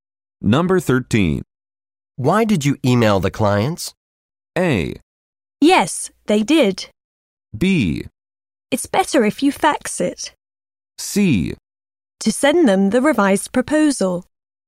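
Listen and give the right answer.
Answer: C: To send them the revised proposal.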